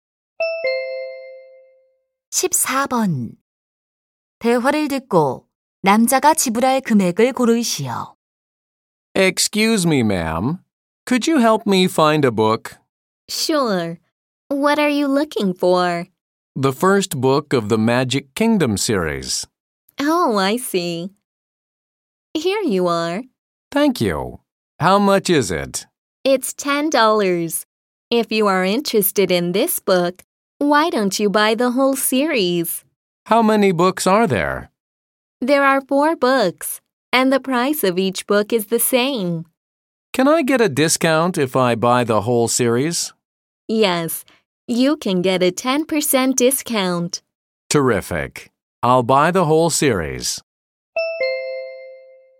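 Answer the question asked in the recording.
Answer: $36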